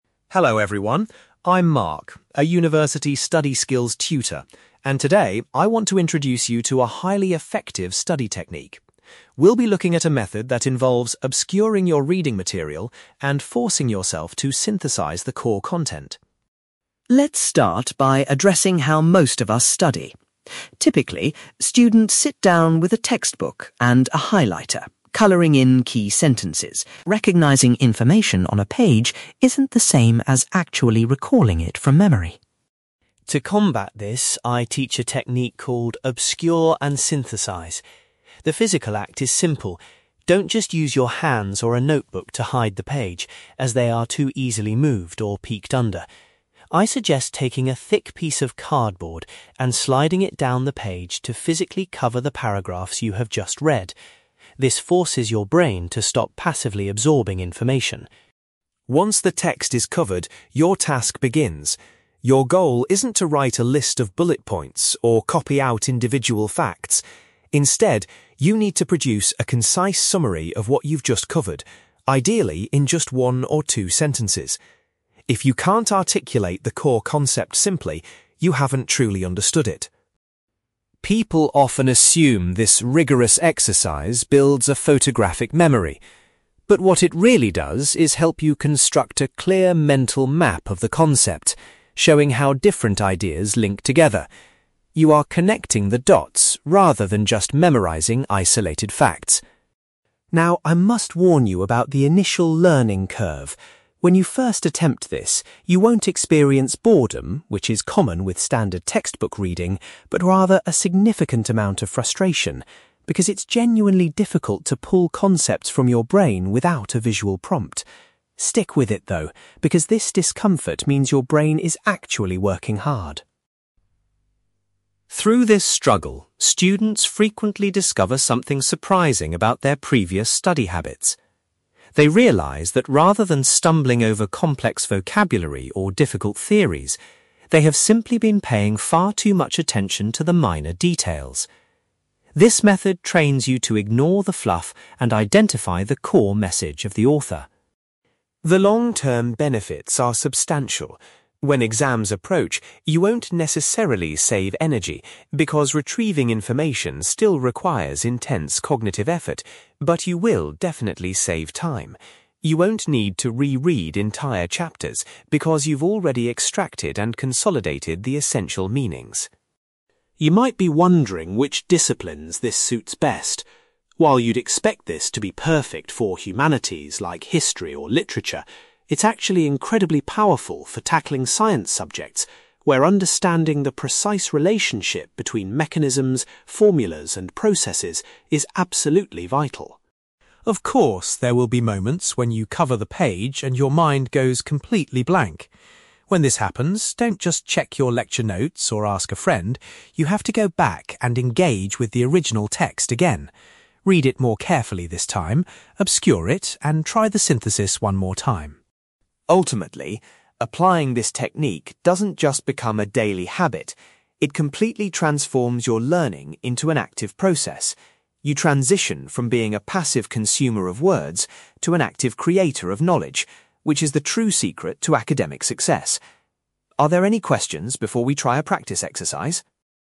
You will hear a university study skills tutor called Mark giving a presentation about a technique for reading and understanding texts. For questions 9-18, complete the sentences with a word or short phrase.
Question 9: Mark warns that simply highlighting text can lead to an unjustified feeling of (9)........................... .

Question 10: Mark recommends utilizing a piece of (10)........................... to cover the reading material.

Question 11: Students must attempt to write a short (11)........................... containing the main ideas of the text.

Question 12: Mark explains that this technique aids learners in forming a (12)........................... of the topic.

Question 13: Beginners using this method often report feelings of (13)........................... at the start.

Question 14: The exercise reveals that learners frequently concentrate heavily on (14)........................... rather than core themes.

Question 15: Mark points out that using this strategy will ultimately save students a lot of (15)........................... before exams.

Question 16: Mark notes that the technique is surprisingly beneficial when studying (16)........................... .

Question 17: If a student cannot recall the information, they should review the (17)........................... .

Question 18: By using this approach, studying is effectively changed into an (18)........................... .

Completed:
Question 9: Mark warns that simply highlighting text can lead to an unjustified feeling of confidence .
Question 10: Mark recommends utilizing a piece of cardboard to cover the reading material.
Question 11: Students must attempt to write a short summary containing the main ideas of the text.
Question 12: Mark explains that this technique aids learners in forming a mental map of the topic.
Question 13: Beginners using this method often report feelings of frustration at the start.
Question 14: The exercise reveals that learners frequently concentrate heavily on minor details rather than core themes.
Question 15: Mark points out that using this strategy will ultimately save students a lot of time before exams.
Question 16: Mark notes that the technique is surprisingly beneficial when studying science subjects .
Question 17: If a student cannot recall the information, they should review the original text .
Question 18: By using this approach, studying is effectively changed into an active process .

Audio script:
Mark: Hello everyone, I'm Mark, a university study skills tutor, and today I want to introduce you to a highly effective study technique. We'll be looking at a method that involves obscuring your reading material and forcing yourself to synthesize the core content.
Let's start by addressing how most of us study. Typically, students sit down with a textbook and a highlighter, coloring in key sentences. You might think this gives you a deep understanding of the material. However, research shows that it mostly just creates a false sense of confidence, because recognizing information on a page isn't the same as actually recalling it from memory.
To combat this, I teach a technique called 'obscure and synthesize'. The physical act is simple. Don't just use your hands or a notebook to hide the page, as they are too easily moved or peeked under. I suggest taking a thick piece of cardboard and sliding it down the page to physically cover the paragraphs you have just read. This forces your brain to stop passively absorbing information.
Once the text is covered, your task begins. Your goal isn't to write a list of bullet points or copy out individual facts. Instead, you need to produce a concise summary of what you've just covered, ideally in just one or two sentences. If you can't articulate the core concept simply, you haven't truly understood it.
People often assume this rigorous exercise builds a photographic memory. But what it really does is help you construct a clear mental map of the concepts, showing how different ideas link together. You are connecting the dots rather than just memorizing isolated facts.
Now, I must warn you about the initial learning curve. When you first attempt this, you won't experience boredom—which is common with standard textbook reading—but rather a significant amount of frustration, because it's genuinely difficult to pull concepts from your brain without a visual prompt. Stick with it, though, because this discomfort means your brain is actually working hard.
Through this struggle, students frequently discover something surprising about their previous study habits. They realize that rather than stumbling over complex vocabulary or difficult theories, they have simply been paying far too much attention to the minor details. This method trains you to ignore the fluff and identify the core message of the author.
The long-term benefits are substantial. When exams approach, you won't necessarily save energy, because retrieving information still requires intense cognitive effort, but you will definitely save time. You won't need to re-read entire chapters because you've already extracted and consolidated the essential meanings.
You might be wondering which disciplines this suits best. While you'd expect this to be perfect for humanities like history or literature, it's actually incredibly powerful for tackling science subjects, where understanding the precise relationship between mechanisms, formulas, and processes is absolutely vital.
Of course, there will be moments when you cover the page and your mind goes completely blank. When this happens, don't just check your lecture notes or ask a friend. You have to go back and engage with the original text again. Read it more carefully this time, obscure it, and try the synthesis one more time.
Ultimately, applying this technique doesn't just become a daily habit. It completely transforms your learning into an active process. You transition from being a passive consumer of words to an active creator of knowledge, which is the true secret to academic success. Are there any questions before we try a practice exercise?

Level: B2